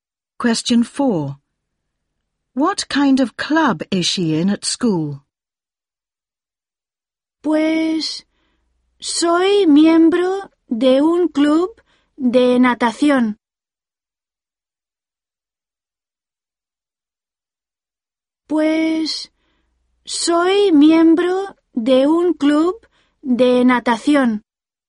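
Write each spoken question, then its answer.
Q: What kind of club is she in at school?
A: A swimming club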